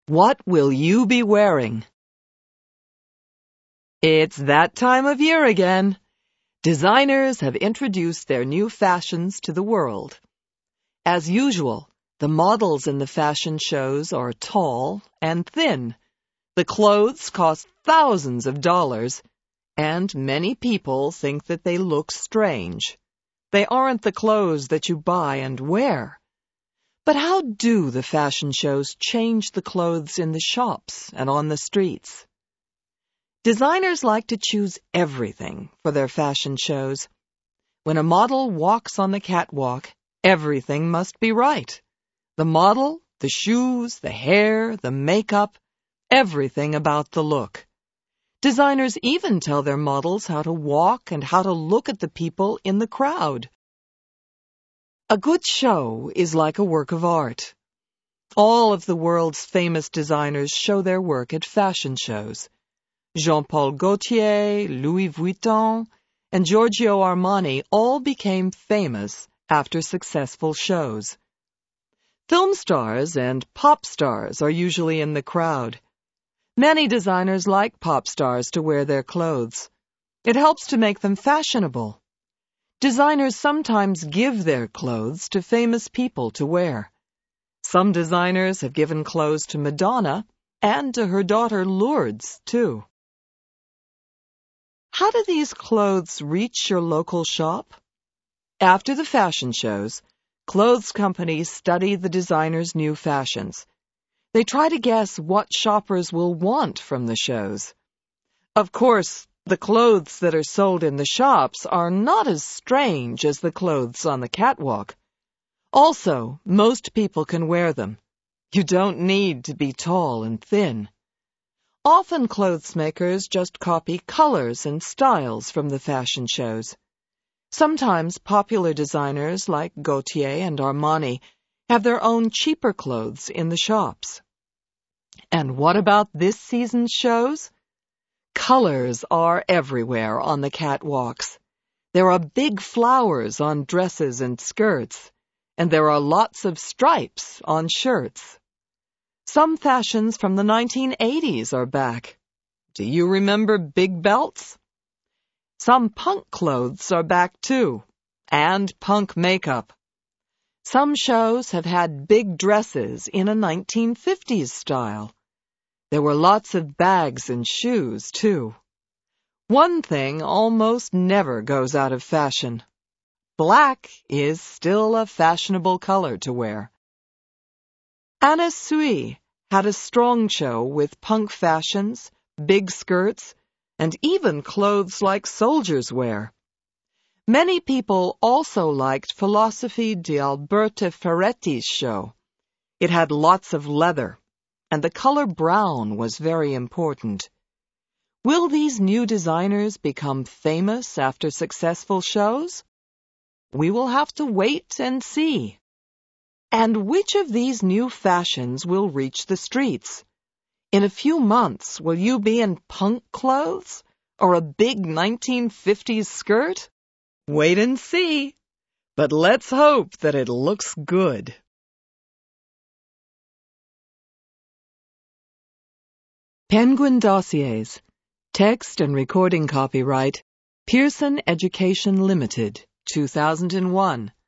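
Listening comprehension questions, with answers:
Answer these questions TRUE or FALSE:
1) The clothes in fashion shows are usually for thin people.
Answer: TRUE

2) Jean Paul Gaultier doesn't show his clothes at a fashion show.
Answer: FALSE

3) The clothes at the fashion shows are not worn by anybody.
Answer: FALSE

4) Philosophy di Alberta Ferretti's clothes were all red.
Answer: FALSE

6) Punk clothes were big in some new shows.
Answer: TRUE

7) Many styles from the new shows were popular long ago.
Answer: TRUE

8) Coats with stripes were big in this year's shows.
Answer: FALSE

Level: LOW INTERMEDIATE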